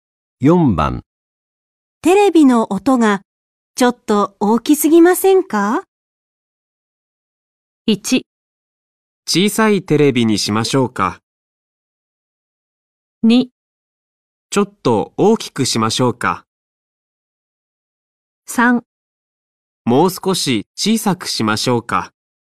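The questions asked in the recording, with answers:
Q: テレビの音がちょっと大きすぎませんか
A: 3: もう少し小さくしましょうか

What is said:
1
小さいテレビにしましょうか。
2
ちょっと大きくしましょうか。
3
もう少し小さくしましょうか。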